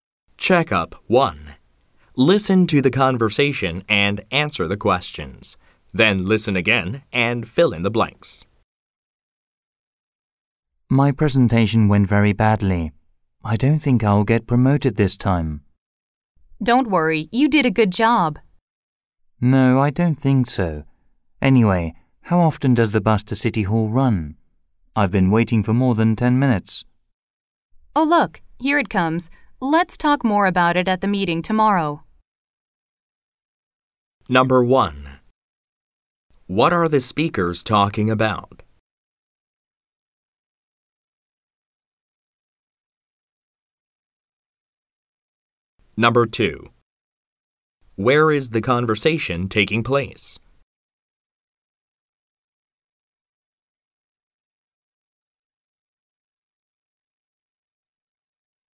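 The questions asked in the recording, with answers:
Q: What are the speakers talking about?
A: The man's presentation, which he thinks went badly

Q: Where is the conversation taking place?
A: At a bus stop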